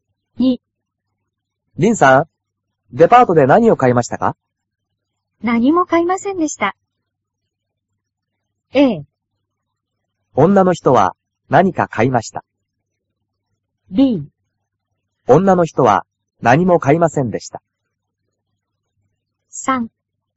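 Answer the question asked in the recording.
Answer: B: 女の人は何も買いませんでした。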